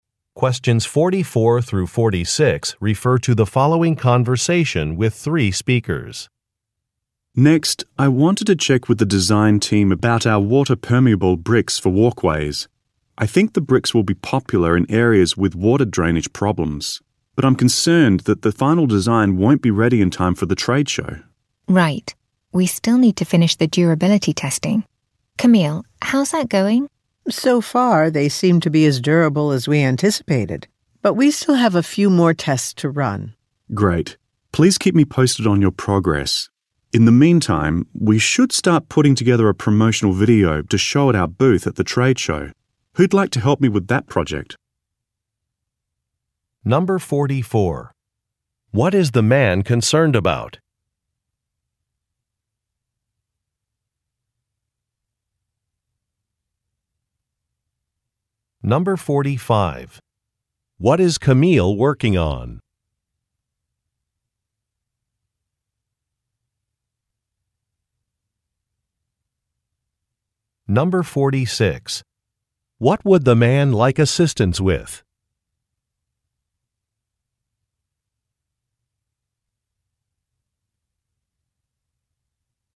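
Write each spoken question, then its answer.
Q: What is the man concerned about?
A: The final design won't be ready in time for the trade show

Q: What is Camille working on?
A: Durability testing of the bricks

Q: What would the man like assistance with?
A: Making a promotional video for the trade show booth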